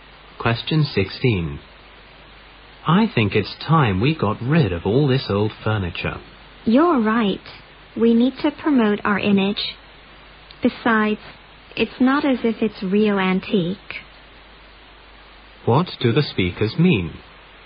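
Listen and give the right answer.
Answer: They should replace the old furniture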